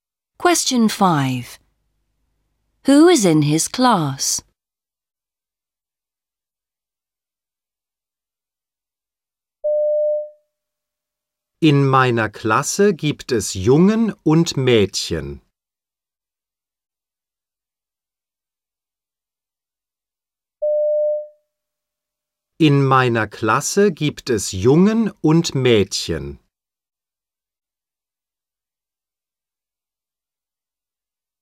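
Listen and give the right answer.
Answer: Boys and girls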